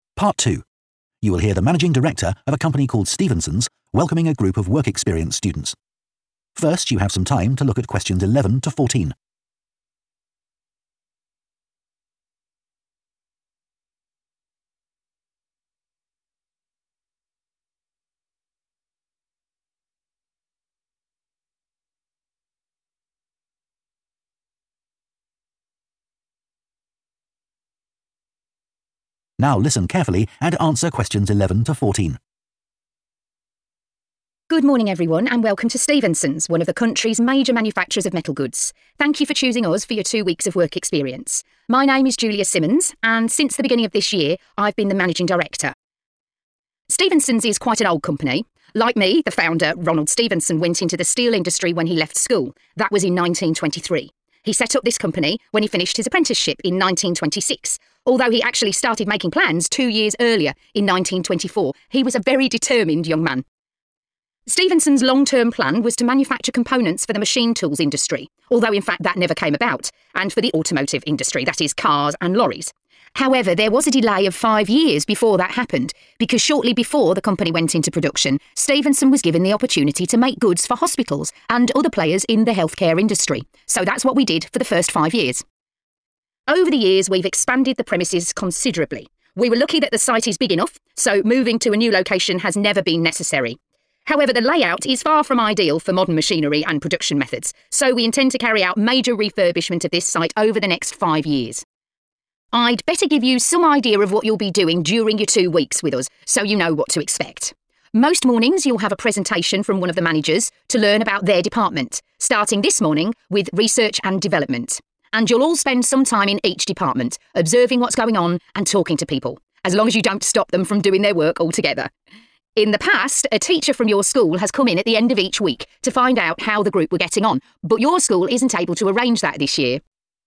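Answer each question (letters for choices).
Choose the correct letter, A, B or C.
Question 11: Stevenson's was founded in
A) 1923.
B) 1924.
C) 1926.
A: C

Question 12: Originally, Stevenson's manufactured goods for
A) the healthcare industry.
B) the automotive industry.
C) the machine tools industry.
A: A

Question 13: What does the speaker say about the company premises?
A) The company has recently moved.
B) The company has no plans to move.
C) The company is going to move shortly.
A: B

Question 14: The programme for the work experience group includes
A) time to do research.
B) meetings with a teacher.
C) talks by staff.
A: C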